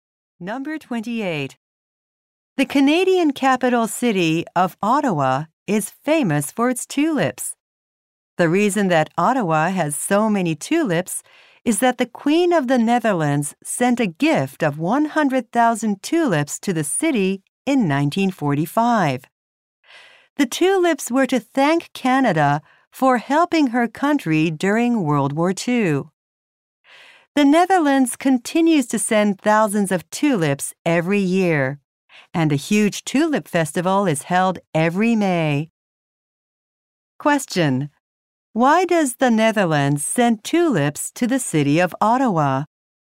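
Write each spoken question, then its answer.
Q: Why does the Netherlands send tulips to the city of Ottawa?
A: To thank Canada for helping during World War II.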